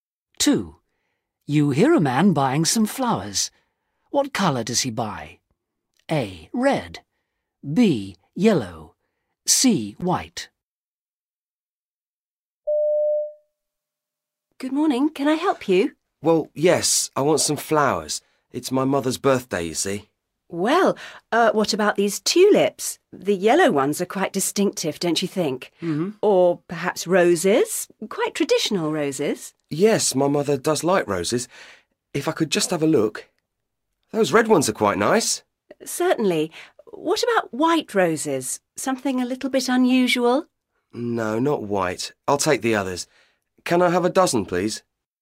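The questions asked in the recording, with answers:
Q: What colour does he buy?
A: A: Red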